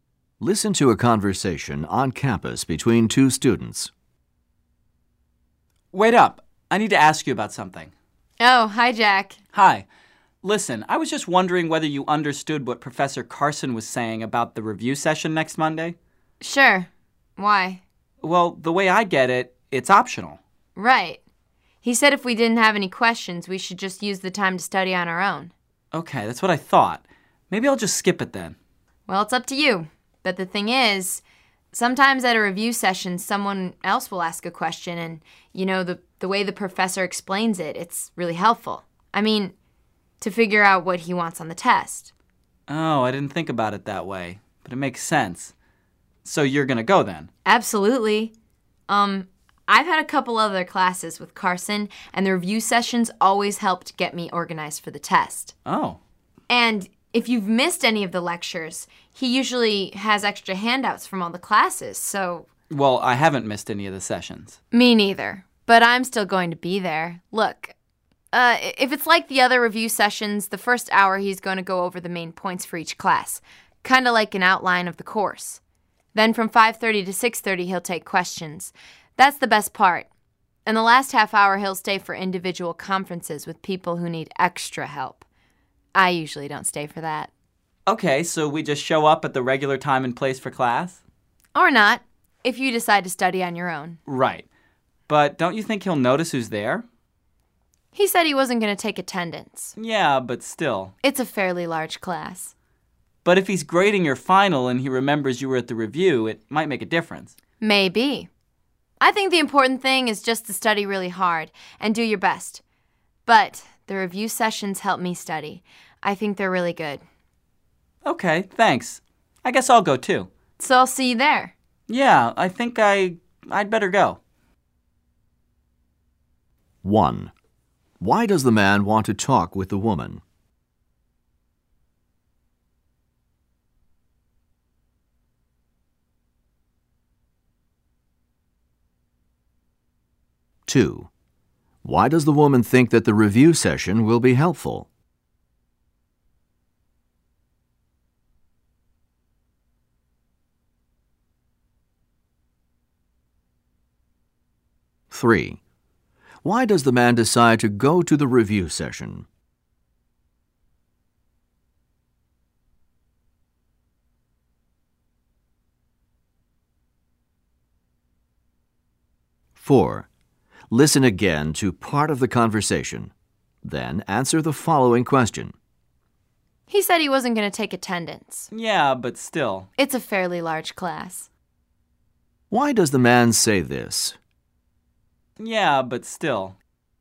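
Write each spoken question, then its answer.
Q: Why does the man want to talk with the woman?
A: To check what the professor said about the review session (whether it is optional)

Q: Why does the woman think that the review session will be helpful?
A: Hearing the professor answer other students' questions helps show what he wants on the test

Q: Why does the man say this?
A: He thinks the professor may still notice who attends the review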